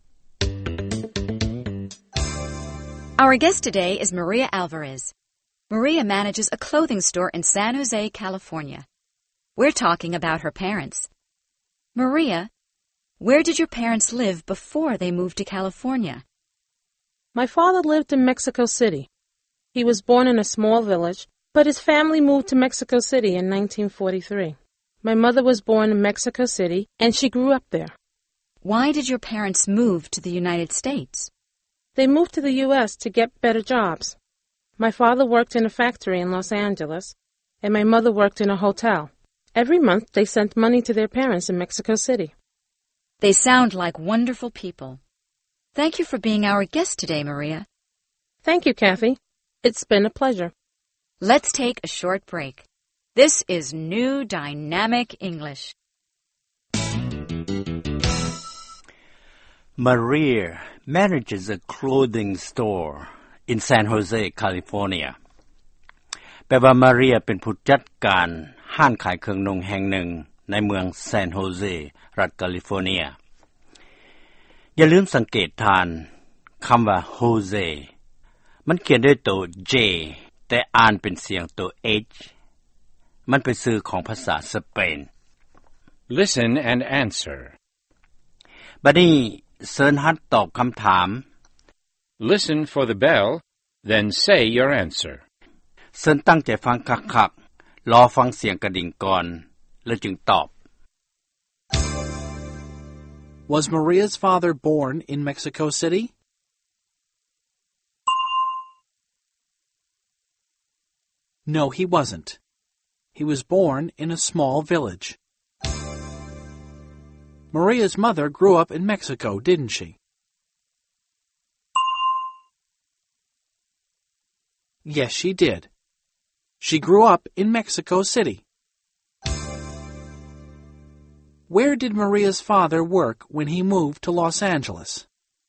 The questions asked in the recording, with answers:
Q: Was Maria's father born in Mexico City?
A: No, he wasn't. He was born in a small village.

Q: Where did Maria's father work when he moved to Los Angeles?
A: He worked in a factory.